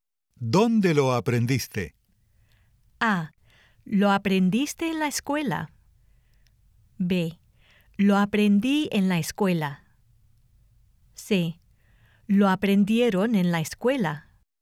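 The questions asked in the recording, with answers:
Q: ¿Dónde lo aprendiste?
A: B: Lo aprendí en la escuela.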